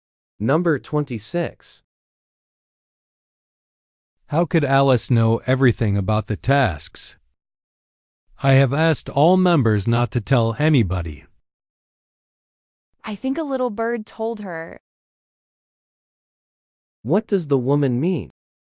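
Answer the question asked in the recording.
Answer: Someone secretly told Alice.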